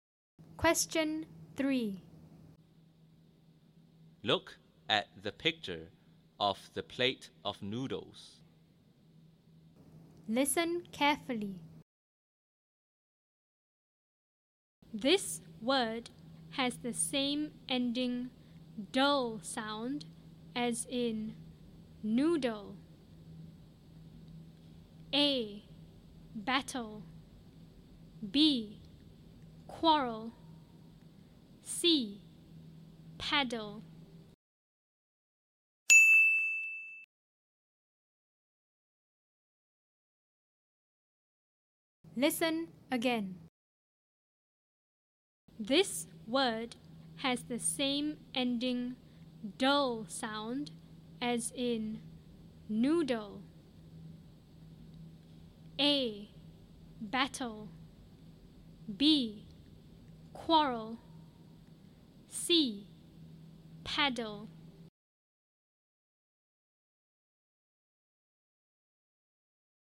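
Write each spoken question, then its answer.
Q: This word has the same ending "dull" sound as in noodle.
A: C: Paddle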